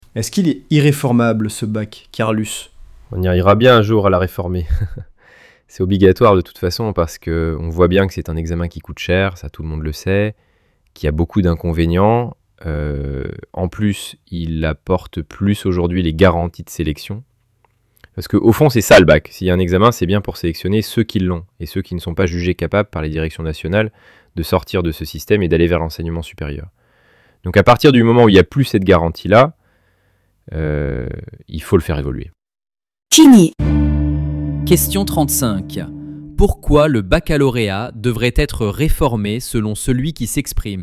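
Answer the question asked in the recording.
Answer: Parce qu'il coûte cher, a beaucoup d'inconvénients et n'apporte plus de garanties de sélection.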